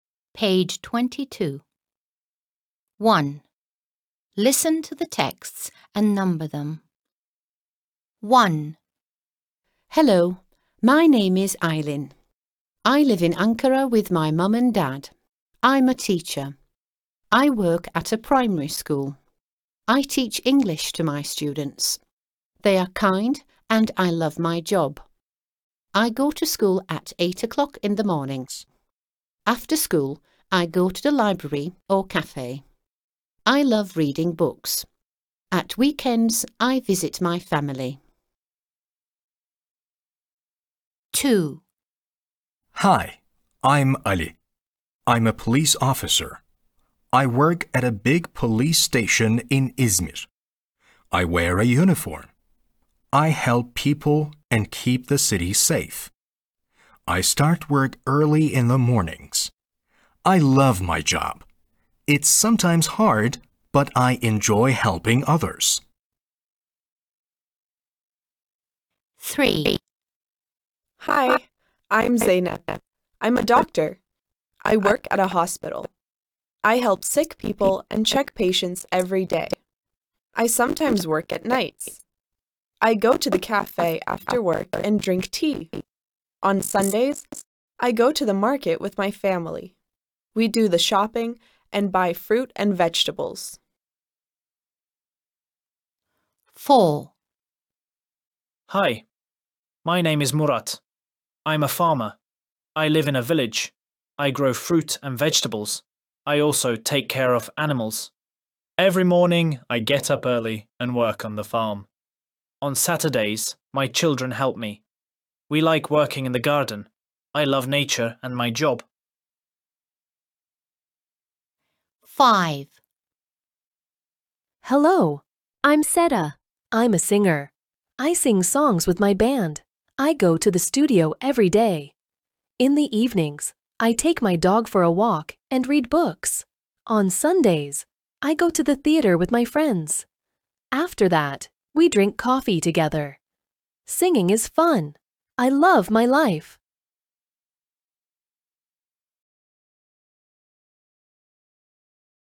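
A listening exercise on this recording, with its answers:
1. Listen to the texts and number them.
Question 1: Aylin (öğretmen)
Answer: 1

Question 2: Ali (polis memuru)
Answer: 2

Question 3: Zeynep (doktor)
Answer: 3

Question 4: Murat (çiftçi)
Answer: 4

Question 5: Seda (şarkıcı)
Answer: 5

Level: 5. Sınıf İngilizce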